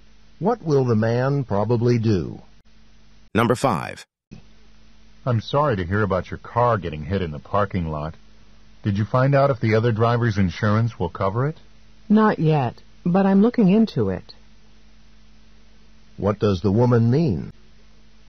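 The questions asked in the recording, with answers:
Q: What does the woman mean?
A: She doesn't know yet whether the insurance will cover it, but she is checking.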